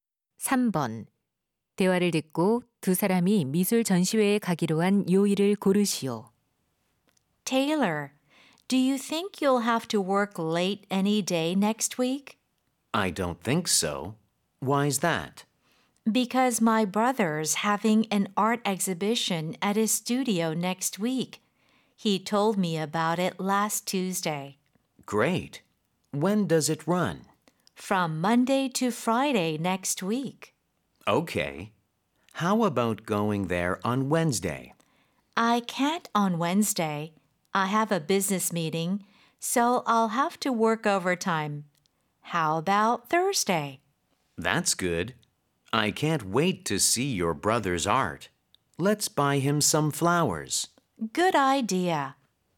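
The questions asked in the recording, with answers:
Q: 대화를 듣고 두 사람이 미술 전시회에 가기로 한 요일을 고르시오.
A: 목요일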